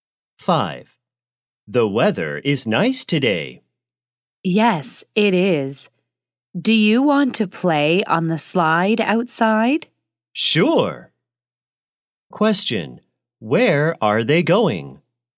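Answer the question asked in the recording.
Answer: To the playground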